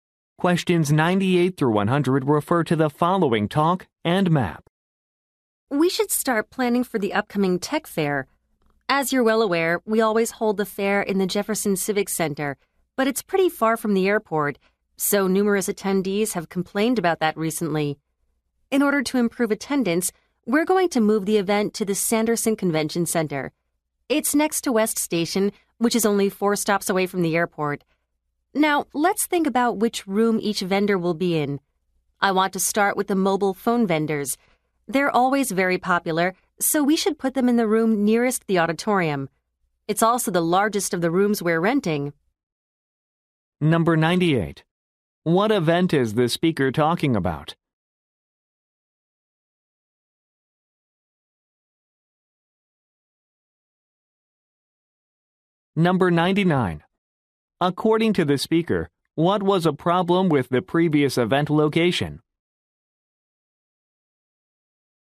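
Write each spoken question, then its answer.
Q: What event is the speaker talking about?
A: A tech fair

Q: According to the speaker, what was a problem with the previous event location?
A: It was far from the airport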